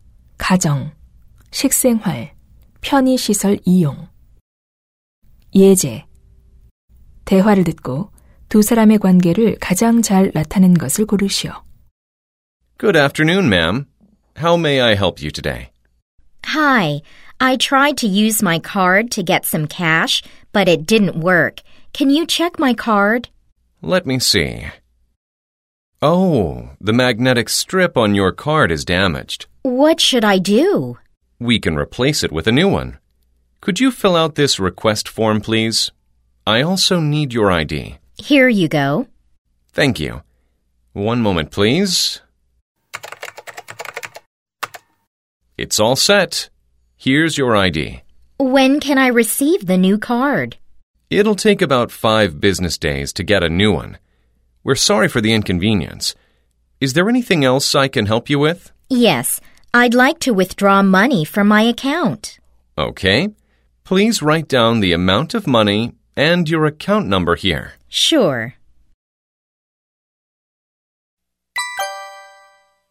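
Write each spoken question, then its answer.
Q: 대화를 듣고 두 사람의 관계를 가장 잘 나타낸 것을 고르시오.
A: 은행 직원 - 고객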